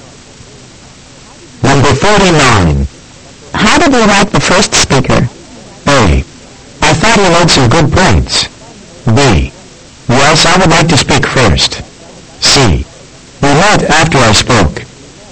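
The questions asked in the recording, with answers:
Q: How did you like the first speaker?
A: A: I thought he made some good points.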